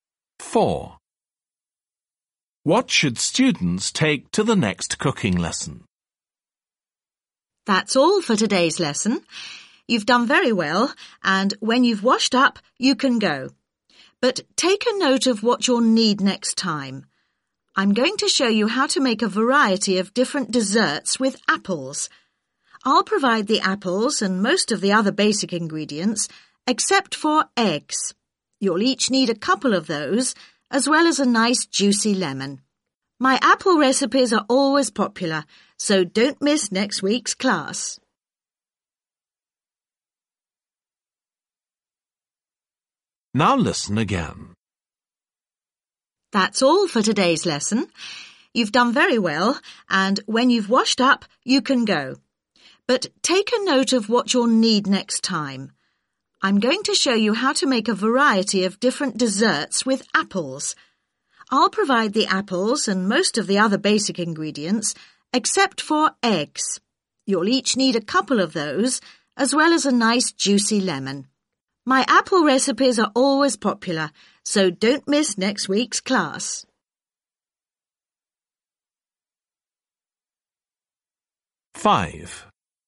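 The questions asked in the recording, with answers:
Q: What should students take to the next cooking lesson?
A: Eggs and a lemon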